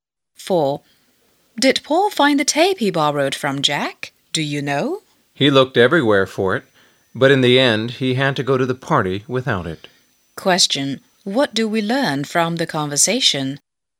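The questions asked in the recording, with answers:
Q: What do we learn from the conversation?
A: Paul didn't find the tape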